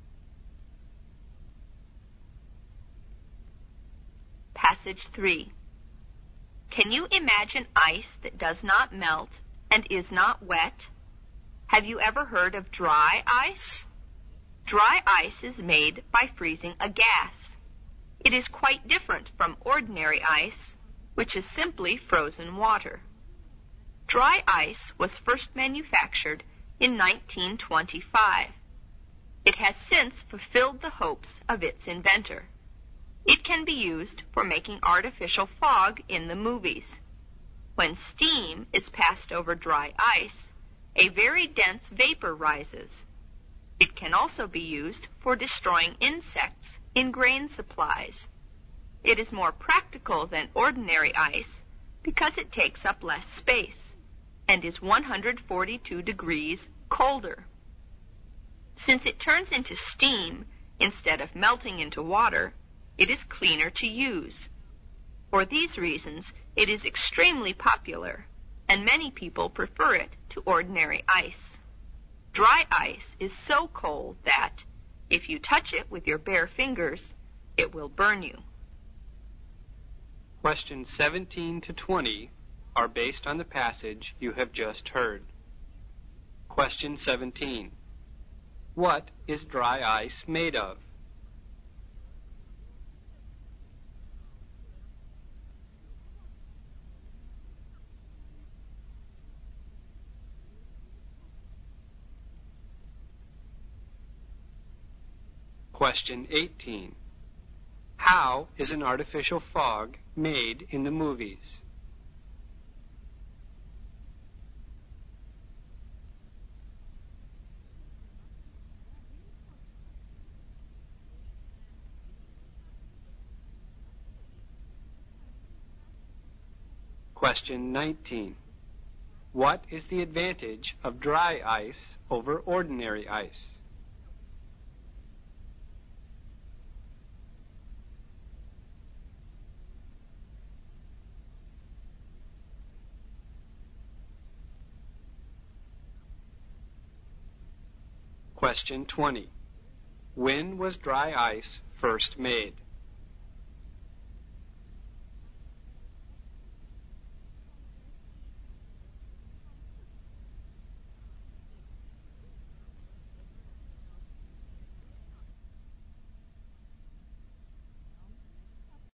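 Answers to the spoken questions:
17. A frozen gas
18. By passing steam over dry ice
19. It takes up less space, is colder and cleaner to use
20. In 1925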